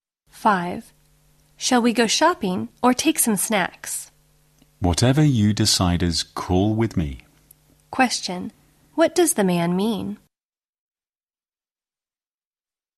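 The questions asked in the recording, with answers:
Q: What does the man mean?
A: Either choice is fine with him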